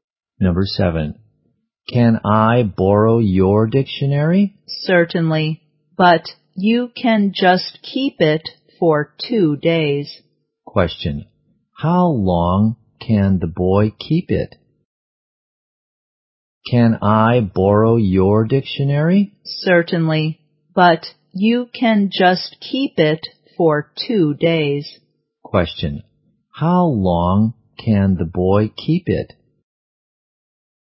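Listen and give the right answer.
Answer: For 2 days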